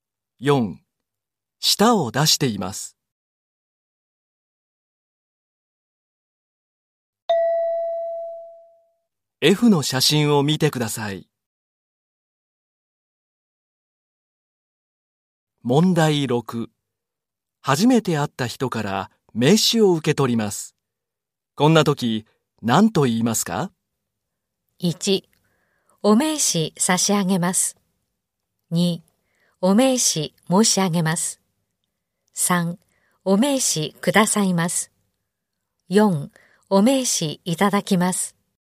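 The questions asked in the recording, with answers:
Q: 初めて会った人から名刺を受け取ります。こんな時、何と言いますか?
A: 4: お名刺いただきます。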